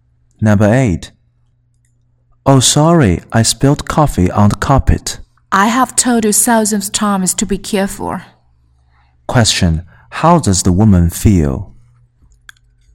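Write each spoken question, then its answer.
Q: How does the woman feel?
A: Annoyed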